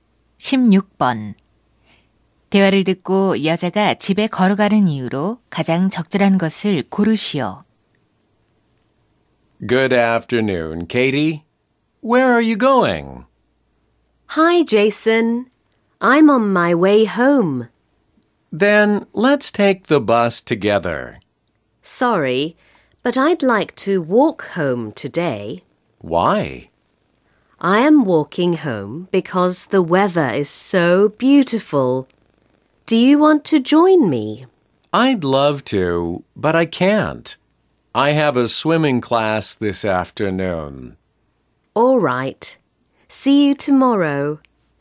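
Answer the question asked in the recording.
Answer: 날씨가 아주 좋아서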